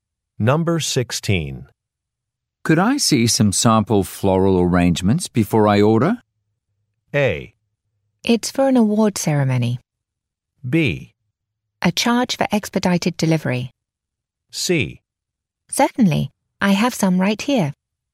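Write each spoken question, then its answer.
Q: Could I see some sample floral arrangements before I order?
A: C: Certainly, I have some right here.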